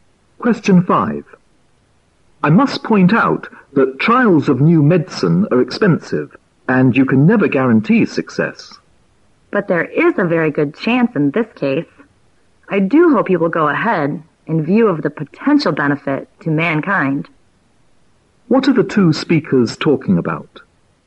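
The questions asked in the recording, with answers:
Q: What are the two speakers talking about?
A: A trial of a new medicine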